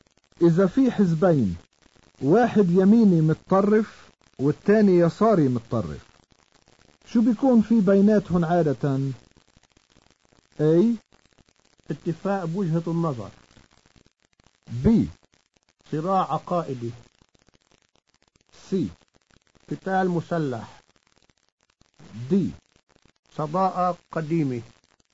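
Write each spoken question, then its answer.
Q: إذا في حزبين واحد يميني متطرف والتاني يساري متطرف شو بيكون في بيناتهم عادة؟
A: B: صراع عقائدي.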